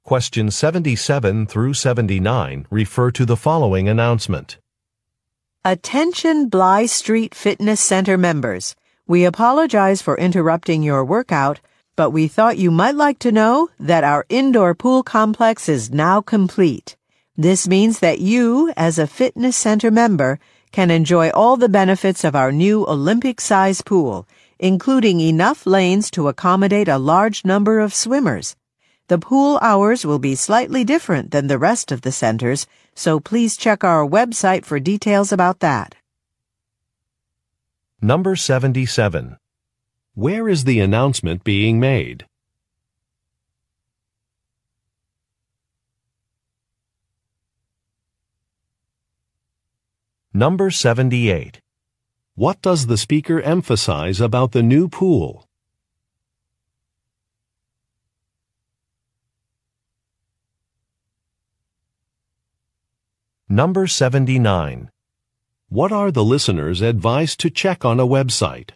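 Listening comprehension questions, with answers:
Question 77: Where is the announcement being made?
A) At a public park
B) At a fitness center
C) At a pool-cleaning company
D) At a hotel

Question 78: What does the speaker emphasize about the new pool?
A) The size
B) The shape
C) The water temperature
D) The technological features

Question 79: What are the listeners advised to check on a Web site?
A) Hours of operation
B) Health regulations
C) Equipment fees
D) Facility maps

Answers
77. B) At a fitness center
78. A) The size
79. A) Hours of operation

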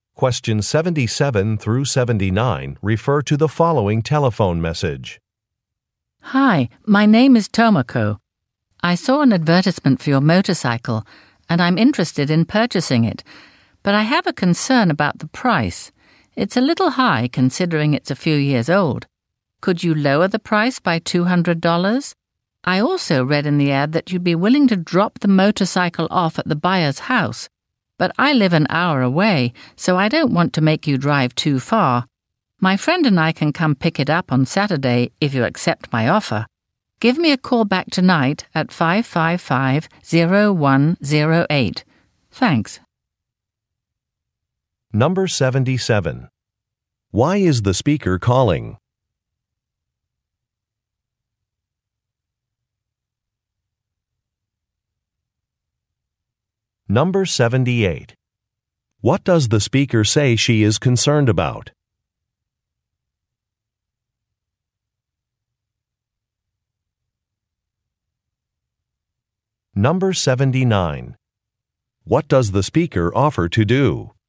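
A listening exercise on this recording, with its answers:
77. Why is the speaker calling?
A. To report an accident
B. To inquire about an advertisement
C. To point out a mistake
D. To give driving directions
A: B. To inquire about an advertisement

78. What does the speaker say she is concerned about?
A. A selling price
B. The cost of a delivery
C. An application requirement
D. The time of an event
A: A. A selling price

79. What does the speaker offer to do?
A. Test a product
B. E-mail a contract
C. Pick up an item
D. Provide a photograph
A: C. Pick up an item

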